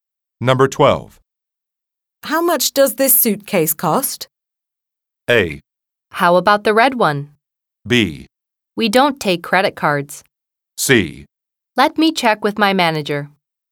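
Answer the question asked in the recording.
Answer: C: Let me check with my manager.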